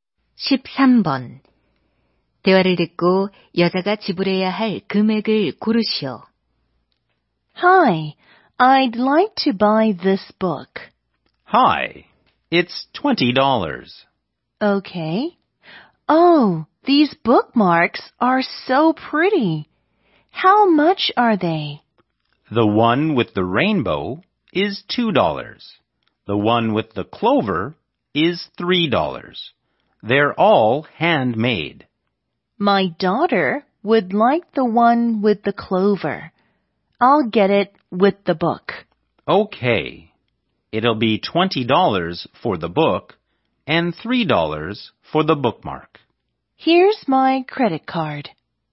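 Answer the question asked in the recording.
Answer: 23달러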